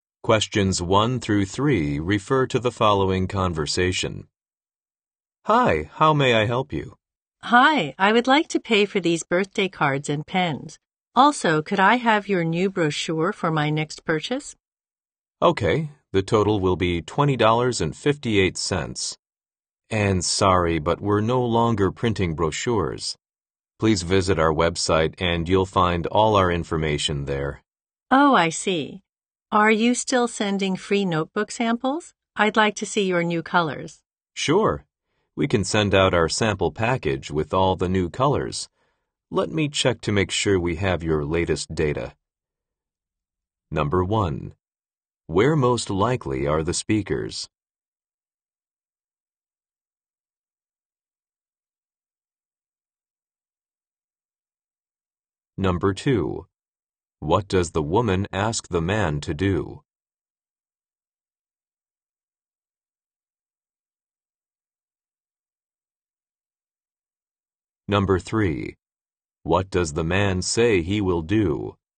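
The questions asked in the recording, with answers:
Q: Where most likely are the speakers?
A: At a stationery store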